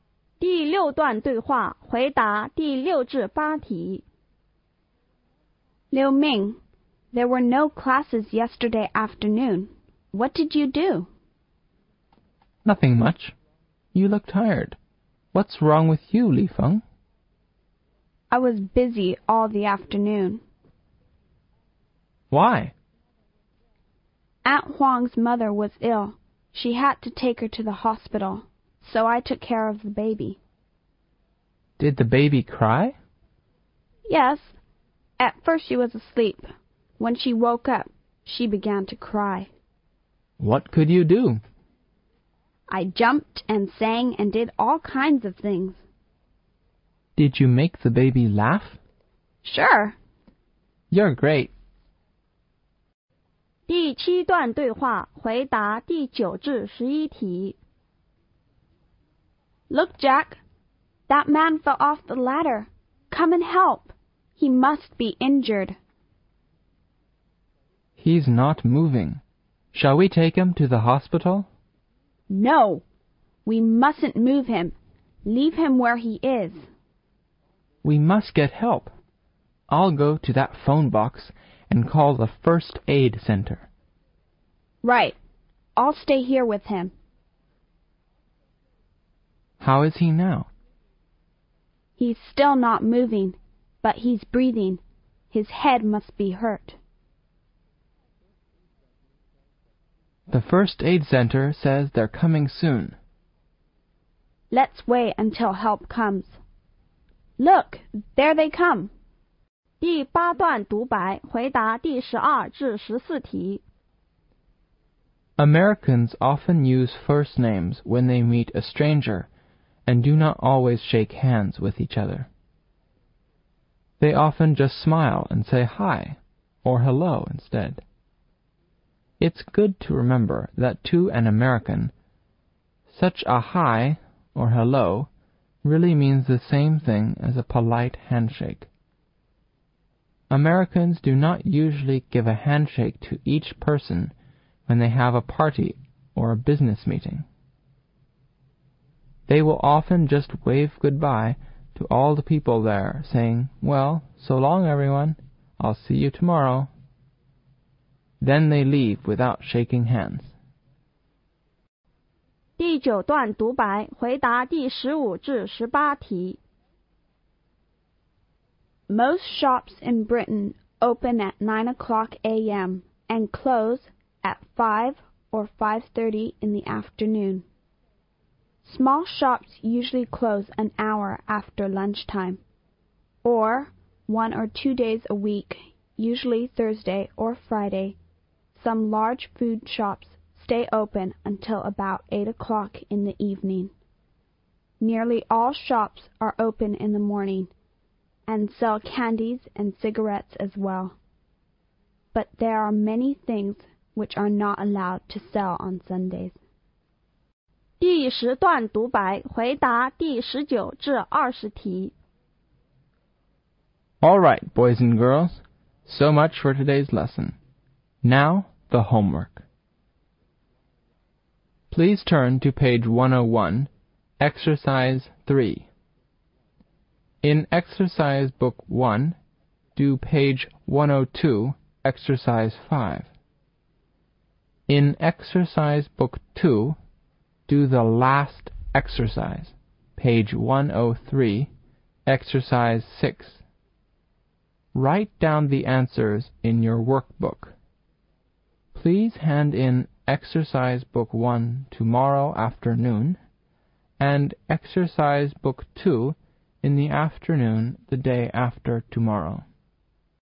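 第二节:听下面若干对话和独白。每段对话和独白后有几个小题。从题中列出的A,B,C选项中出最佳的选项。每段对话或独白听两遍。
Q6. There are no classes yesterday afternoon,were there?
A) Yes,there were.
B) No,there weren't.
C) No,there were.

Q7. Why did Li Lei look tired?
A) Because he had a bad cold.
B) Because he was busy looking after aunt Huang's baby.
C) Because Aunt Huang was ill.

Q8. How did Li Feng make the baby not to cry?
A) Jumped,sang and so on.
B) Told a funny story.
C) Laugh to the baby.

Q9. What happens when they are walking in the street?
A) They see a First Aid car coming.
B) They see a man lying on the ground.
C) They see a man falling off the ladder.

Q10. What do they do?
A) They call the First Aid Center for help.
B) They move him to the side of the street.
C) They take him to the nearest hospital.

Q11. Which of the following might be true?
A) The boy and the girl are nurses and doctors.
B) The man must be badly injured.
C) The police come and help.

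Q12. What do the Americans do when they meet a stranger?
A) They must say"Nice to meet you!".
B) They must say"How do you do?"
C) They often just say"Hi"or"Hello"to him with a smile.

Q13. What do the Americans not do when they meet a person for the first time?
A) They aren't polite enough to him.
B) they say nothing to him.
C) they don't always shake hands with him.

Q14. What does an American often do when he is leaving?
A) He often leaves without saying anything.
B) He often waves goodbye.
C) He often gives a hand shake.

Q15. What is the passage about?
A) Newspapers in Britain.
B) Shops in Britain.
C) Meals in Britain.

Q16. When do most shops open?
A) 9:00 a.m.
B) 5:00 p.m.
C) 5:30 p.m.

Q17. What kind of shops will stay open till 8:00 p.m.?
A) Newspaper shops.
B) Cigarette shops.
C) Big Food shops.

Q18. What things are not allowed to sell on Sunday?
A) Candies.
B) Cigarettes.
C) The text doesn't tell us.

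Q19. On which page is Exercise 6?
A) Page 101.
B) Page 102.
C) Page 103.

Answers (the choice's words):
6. No,there weren't.
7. Because he was busy looking after aunt Huang's baby.
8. Jumped,sang and so on.
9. They see a man falling off the ladder.
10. They call the First Aid Center for help.
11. The man must be badly injured.
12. They often just say"Hi"or"Hello"to him with a smile.
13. they don't always shake hands with him.
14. He often waves goodbye.
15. Shops in Britain.
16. 9:00 a.m.
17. Big Food shops.
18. The text doesn't tell us.
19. Page 103.

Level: 高考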